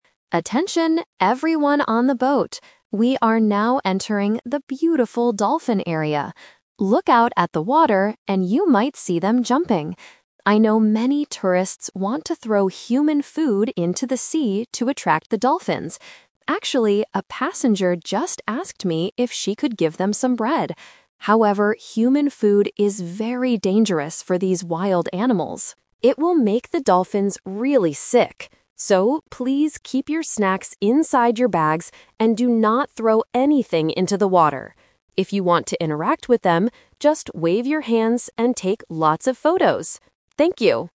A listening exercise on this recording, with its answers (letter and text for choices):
Listen to a tour guide talking on a boat and choose the correct answer (A, B, or C).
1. What did a passenger want to do?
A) Take a lot of photos of the dolphins.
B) Give the dolphins some bread.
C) Swim in the water with the dolphins.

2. Why shouldn't tourists throw human food into the sea?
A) Because it will make the dolphins sick.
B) Because it will make the water dirty.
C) Because the dolphins do not like bread.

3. What does the tour guide want the tourists to do with their snacks?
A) Throw them into the water.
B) Give them to the boat staff.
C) Keep them inside their bags.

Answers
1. B) Give the dolphins some bread.
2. A) Because it will make the dolphins sick.
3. C) Keep them inside their bags.

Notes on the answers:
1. The tour guide clearly says, "a passenger just asked me if she could give them some bread." Option (A) is the trap; the guide tells everyone they can take photos at the end, but it is not what the passenger asked to do. Option (C) is a distractor and not mentioned.
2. The guide explains that human food is dangerous and "will make the dolphins really sick." Options (B) and (C) might be true in real life, but they are not mentioned in the audio.
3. The tour guide gives the final instruction: "So, please keep your snacks inside your bags." Option (A) is the trap; it is exactly what the guide tells the tourists not to do. Option (B) is not mentioned.

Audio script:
Tour Guide: Attention, everyone on the boat! We are now entering the beautiful dolphin area. Look out at the water, and you might see them jumping. I know many tourists want to throw human food into the sea to attract the dolphins. Actually, a passenger just asked me if she could give them some bread. However, human food is very dangerous for these wild animals. It will make the dolphins really sick. So, please keep your snacks inside your bags and do not throw anything into the water. If you want to interact with them, just wave your hands and take lots of photos! Thank you.

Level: A2